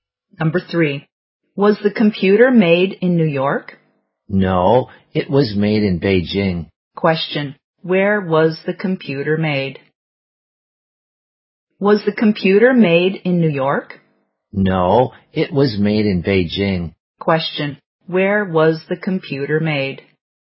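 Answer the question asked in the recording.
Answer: In Beijing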